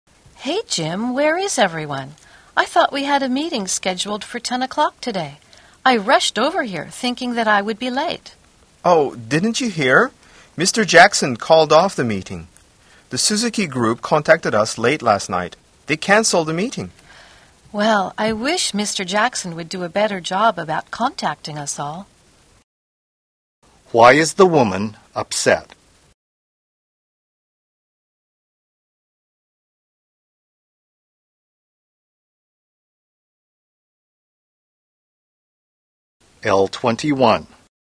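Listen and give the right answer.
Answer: The meeting was canceled and nobody told her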